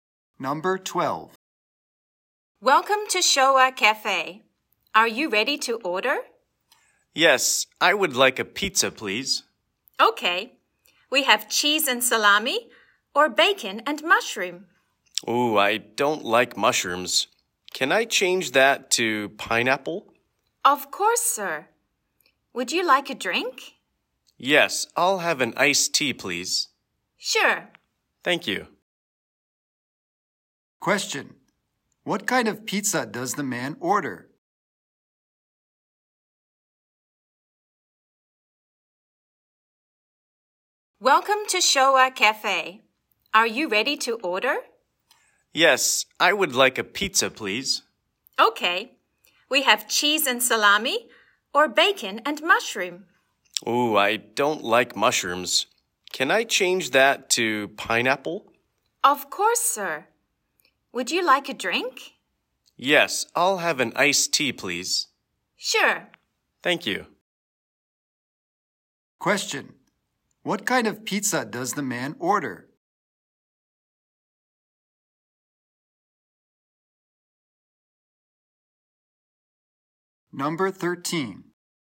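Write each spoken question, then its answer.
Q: What kind of pizza does the man order?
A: Bacon and pineapple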